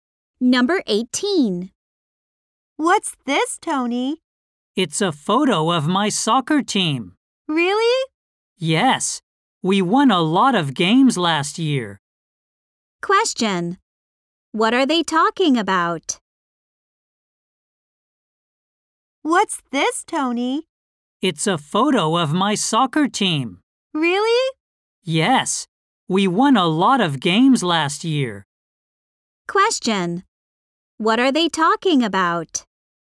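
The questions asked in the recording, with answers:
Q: What are they talking about?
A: A photo of Tony's soccer team.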